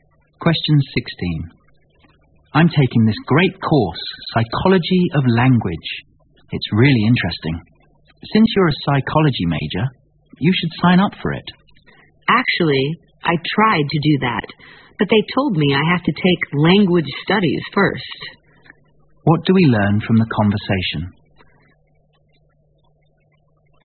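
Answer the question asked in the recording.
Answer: The second speaker has to take language studies before taking Psychology of Language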